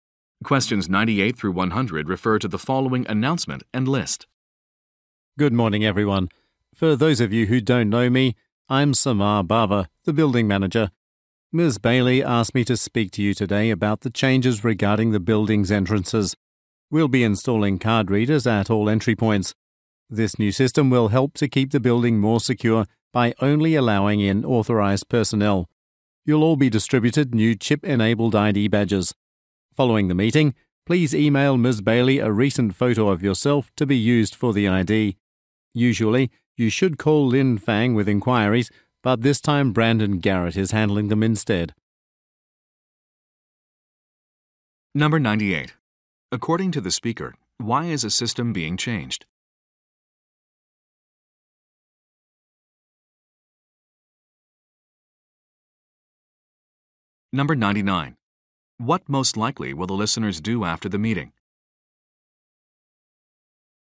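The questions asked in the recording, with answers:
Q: According to the speaker, why is a system being changed?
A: To improve building security

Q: What most likely will the listeners do after the meeting?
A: Email a photo to Ms. Bailey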